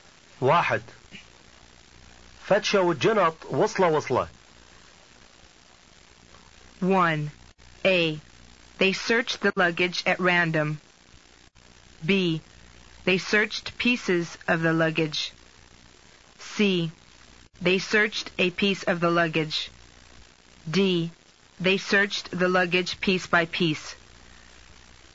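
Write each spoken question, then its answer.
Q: فتشة والجنط وصلة وصلة.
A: D: They searched the luggage piece by piece.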